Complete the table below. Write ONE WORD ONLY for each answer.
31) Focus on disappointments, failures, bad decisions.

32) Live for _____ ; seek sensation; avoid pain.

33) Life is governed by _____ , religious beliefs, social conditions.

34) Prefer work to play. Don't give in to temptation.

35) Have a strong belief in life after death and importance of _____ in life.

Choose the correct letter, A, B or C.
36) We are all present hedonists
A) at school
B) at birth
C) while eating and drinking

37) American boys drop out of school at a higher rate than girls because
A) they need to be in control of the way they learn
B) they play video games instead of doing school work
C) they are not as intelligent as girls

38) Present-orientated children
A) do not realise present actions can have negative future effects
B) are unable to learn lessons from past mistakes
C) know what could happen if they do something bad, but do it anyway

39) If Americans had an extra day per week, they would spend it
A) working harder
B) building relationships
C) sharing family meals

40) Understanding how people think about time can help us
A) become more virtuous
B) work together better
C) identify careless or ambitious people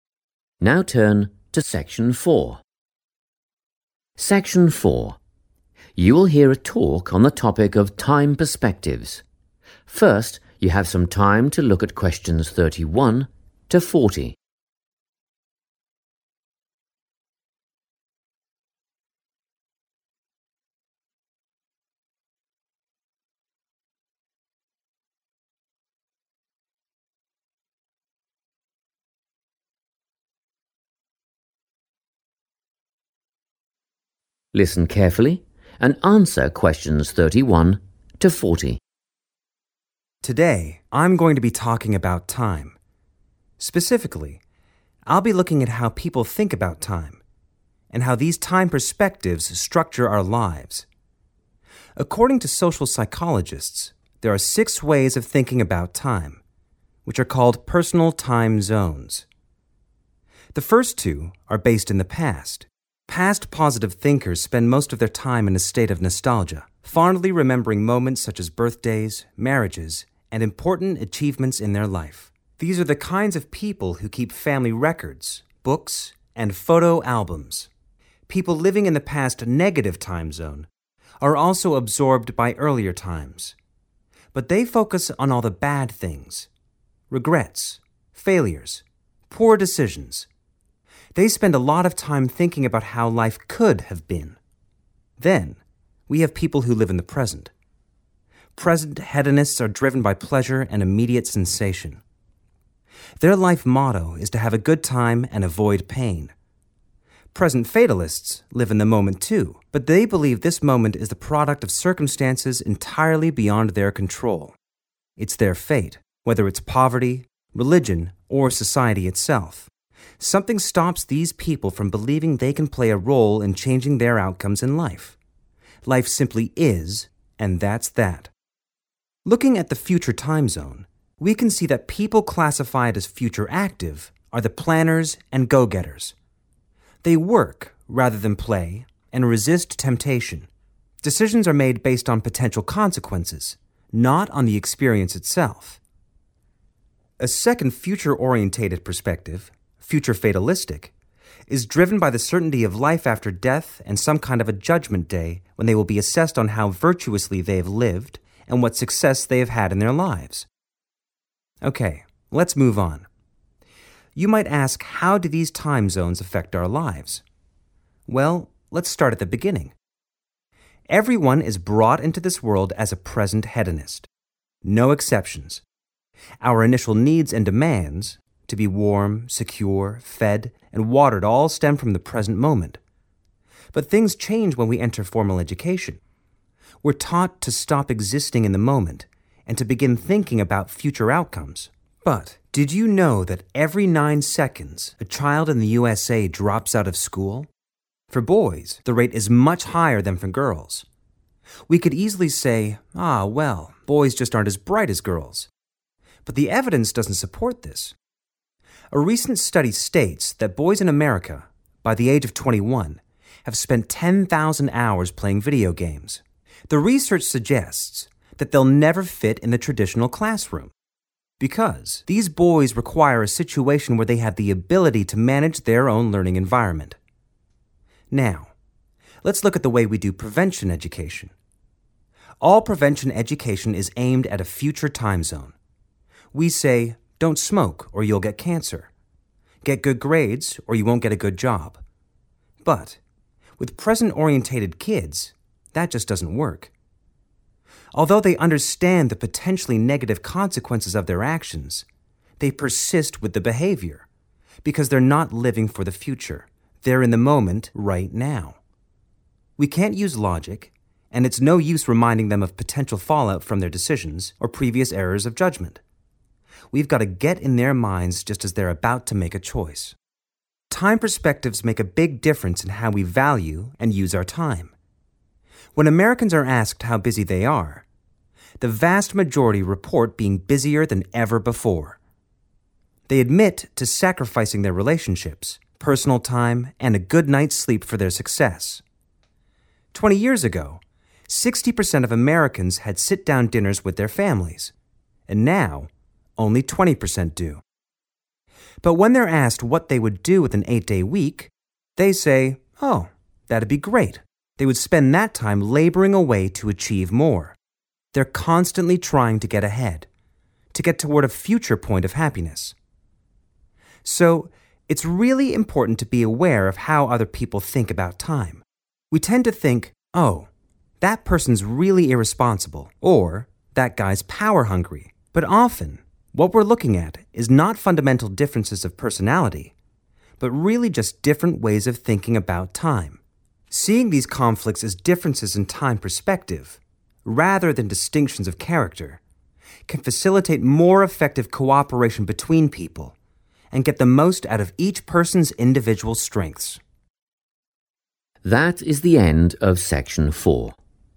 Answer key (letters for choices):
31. negative
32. pleasure
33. poverty
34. active
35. success
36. B
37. A
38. C
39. A
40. B

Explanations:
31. The correct answer is based on the speaker's description of the two ways people look at the past. While 'past positive' thinkers remember good memories, 'past negative' thinkers focus on failures, regrets, and poor decisions. The table asks for the specific name of the time zone outlook that focuses on these disappointments.
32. The correct answer is "pleasure" because the transcript describes people in the "present hedonist" group as being motivated by this feeling. These individuals focus on the "now" and try to find things that make them feel good while avoiding things that are difficult or painful. The phrase "driven by pleasure" in the talk matches the table's requirement for what they "live for."
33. The correct answer is 'poverty' because the speaker describes 'Present fatalists' as people who believe their lives are shaped by circumstances they cannot control. In the talk, the speaker specifically mentions three examples of these uncontrollable circumstances: 'poverty', 'religion', and 'society itself'. In the question's table, 'religious beliefs' matches 'religion' and 'social conditions' matches 'society itself', leaving 'poverty' as the missing word.
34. The correct answer is 'active' because the speaker divides the 'future' time zone into two categories. The first category is 'future active,' which includes people who prefer to work and can resist or 'not give in to' temptation. This perfectly matches the descriptions 'Prefer work to play' and 'Don't give in to temptation' found in the table.
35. The correct answer is 'success' because the speaker describes a group of people called 'future fatalistic.' These people believe that after they die, there will be a 'judgement day.' On this day, how well they lived and the 'success' they achieved in their lives will be looked at and judged.
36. The correct answer is B because the speaker states that 'Everyone' starts life this way. The phrase 'brought into this world' is a common expression meaning birth. The speaker clarifies that our earliest needs, like being fed or kept warm, are focused entirely on the immediate moment, which defines the 'present hedonist' perspective.
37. The correct answer is A because the speaker mentions that boys do not fit into normal classrooms well. The speaker explains that this is because boys need to 'manage,' or be in charge of, their own learning. While video games are mentioned, they are used to explain why boys want to control their environment, and the speaker specifically says that the idea that boys are less smart than girls (choice C) is not true.
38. The correct answer is C because the talk explains that children who live in the present understand the negative results (consequences) that might happen in the future. However, they continue (persist) with the behavior because they are only focused on the current moment. The speaker mentions that even if you tell them about things like cancer or job problems, it doesn't stop them because they aren't thinking about 'then,' only 'now.'
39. The correct answer is A because the speaker explains that many Americans are very focused on success and being busy. They already give up things like relationships and sleep to get ahead. The transcript specifically says that if they were given an extra day (an 'eight-day week'), they would spend that time 'labouring away,' which is a synonym for working very hard, to achieve more goals.
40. The correct answer is B because the speaker explains that understanding how others view time allows for better teamwork. Instead of judging a person's character (like calling them irresponsible or power-hungry), we can see their actions as a result of their time perspective. This shift in thinking helps people collaborate, or 'cooperate', more effectively. Keywords like 'effective cooperation' mean the same as 'work together better'.

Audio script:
Section 4
You will hear a talk on the topic of time perspectives. First you have some time to look at questions 31 to 40.
[20 seconds]
Listen carefully and answer questions 31 to 40.
Today, I'm going to be talking about time. Specifically I'll be looking at how people think about time, and how these time perspectives structure our lives. According to social psychologists, there are six ways of thinking about time, which are called personal time zones.
The first two are based in the past. Past positive thinkers spend most of their time in a state of nostalgia, fondly remembering moments such as birthdays, marriages and important achievements in their life. These are the kinds of people who keep family records, books and photo albums. People living in the past negative time zone are also absorbed by earlier times, but they focus on all the bad things – regrets, failures, poor decisions. They spend a lot of time thinking about how life could have been.
Then, we have people who live in the present. Present hedonists are driven by pleasure and immediate sensation. Their life motto is to have a good time and avoid pain. Present fatalists live in the moment too, but they believe this moment is the product of circumstances entirely beyond their control; it's their fate. Whether it's poverty, religion or society itself, something stops these people from believing they can play a role in changing their outcomes in life. Life simply "is" and that's that.
Looking at the future time zone, we can see that people classified as future active are the planners and go-getters. They work rather than play and resist temptation. Decisions are made based on potential consequences, not on the experience itself. A second future-orientated perspective, future fatalistic, is driven by the certainty of life after death and some kind of a judgement day when they will be assessed on how virtuously they have lived and what success they have had in their lives.
Okay, let's move on. You might ask "how do these time zones affect our lives?" Well, let's start at the beginning. Everyone is brought into this world as a present hedonist. No exceptions. Our initial needs and demands – to be warm, secure, fed and watered – all stem from the present moment. But things change when we enter formal education – we're taught to stop existing in the moment and to begin thinking about future outcomes.
But, did you know that every nine seconds a child in the USA drops out of school? For boys, the rate is much higher than for girls. We could easily say "Ah, well, boys just aren't as bright as girls" but the evidence doesn't support this. A recent study states that boys in America, by the age of twenty one, have spent 10,000 hours playing video games. The research suggests that they'll never fit in the traditional classroom because these boys require a situation where they have the ability to manage their own learning environment.
Now, let's look at the way we do prevention education. All prevention education is aimed at a future time zone. We say "don't smoke or you'll get cancer", "get good grades or you won't get a good job". But with present-orientated kids that just doesn't work. Although they understand the potentially negative consequences of their actions, they persist with the behaviour because they're not living for the future; they're in the moment right now. We can't use logic and it's no use reminding them of potential fall-out from their decisions or previous errors of judgment – we've got to get in their minds just as they're about to make a choice.
Time perspectives make a big difference in how we value and use our time. When Americans are asked how busy they are, the vast majority report being busier than ever before. They admit to sacrificing their relationships, personal time and a good night's sleep for their success. Twenty years ago, 60% of Americans had sit-down dinners with their families, and now only 20% do. But when they're asked what they would do with an eight-day week, they say "Oh that'd be great". They would spend that time labouring away to achieve more. They're constantly trying to get ahead, to get toward a future point of happiness.
So, it's really important to be aware of how other people think about time. We tend to think: "Oh, that person's really irresponsible" or "That guy's power hungry" but often what we're looking at is not fundamental differences of personality, but really just different ways of thinking about time. Seeing these conflicts as differences in time perspective, rather than distinctions of character, can facilitate more effective cooperation between people and get the most out of each person's individual strengths.
That is the end of section 4. You now have half a minute to check your answers.